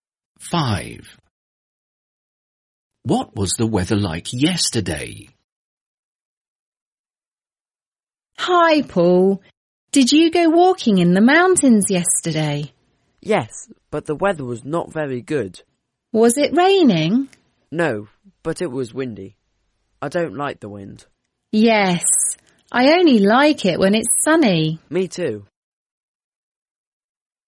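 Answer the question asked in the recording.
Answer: Windy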